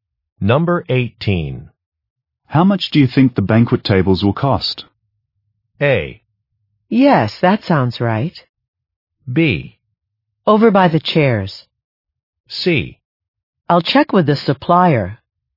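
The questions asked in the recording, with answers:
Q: How much do you think the banquet tables will cost?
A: C: I'll check with the supplier.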